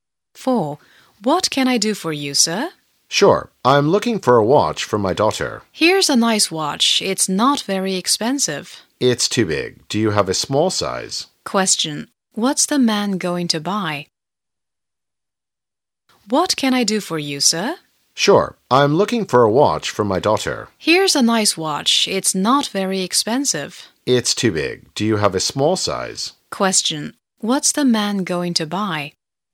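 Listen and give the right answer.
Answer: A watch for his daughter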